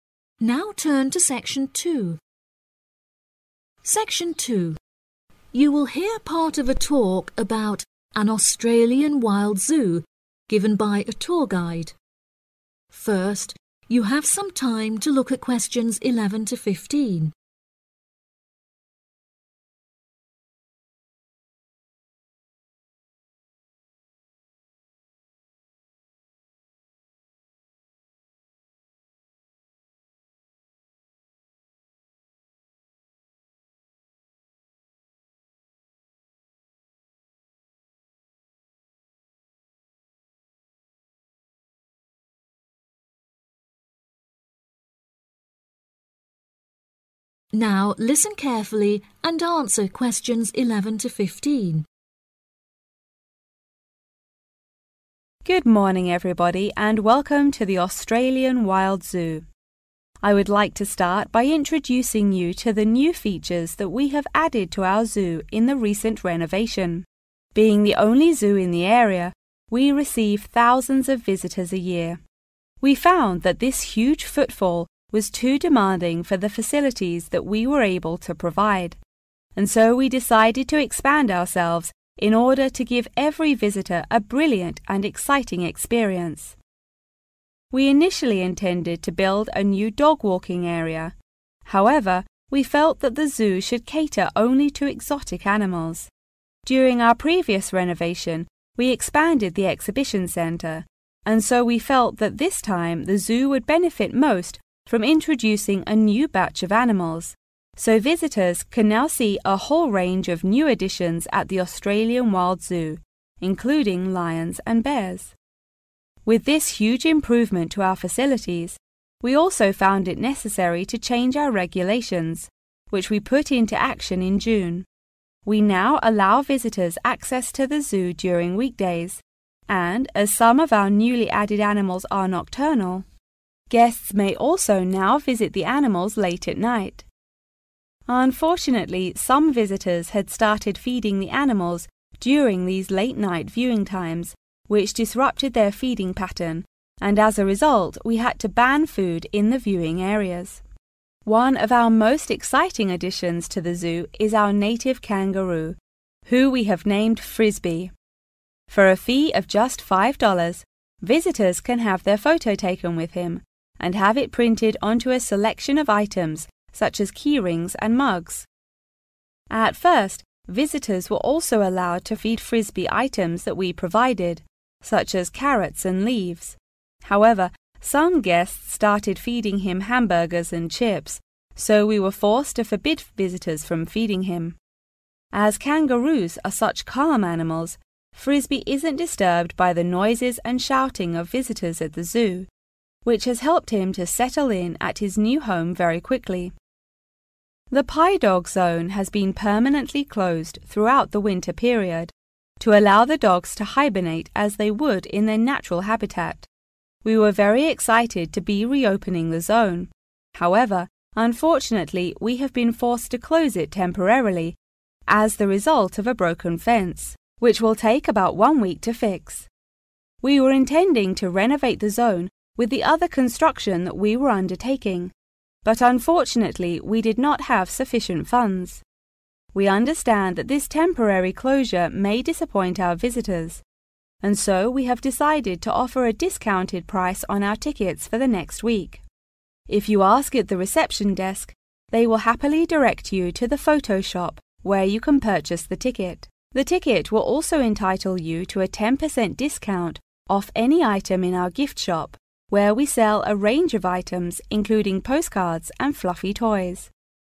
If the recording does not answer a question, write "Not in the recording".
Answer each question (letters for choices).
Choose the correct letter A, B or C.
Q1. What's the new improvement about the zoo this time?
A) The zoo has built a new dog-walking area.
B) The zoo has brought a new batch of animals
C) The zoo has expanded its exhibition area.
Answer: B

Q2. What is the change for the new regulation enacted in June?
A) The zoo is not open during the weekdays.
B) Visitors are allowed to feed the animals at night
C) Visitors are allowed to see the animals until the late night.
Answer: C

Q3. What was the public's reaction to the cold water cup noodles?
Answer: Not in the recording

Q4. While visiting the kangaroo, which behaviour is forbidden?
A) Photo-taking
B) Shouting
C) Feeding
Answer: C

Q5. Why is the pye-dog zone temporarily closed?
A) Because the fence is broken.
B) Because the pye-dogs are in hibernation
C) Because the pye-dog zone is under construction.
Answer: A

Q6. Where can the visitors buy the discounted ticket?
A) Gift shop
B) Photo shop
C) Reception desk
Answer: B